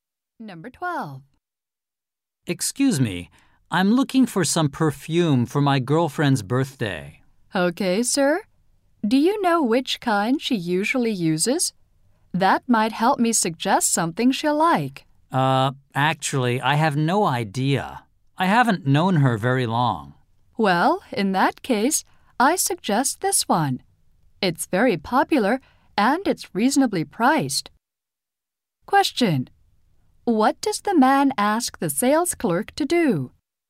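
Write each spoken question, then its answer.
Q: What does the man ask the sales clerk to do?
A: Help him choose perfume for his girlfriend.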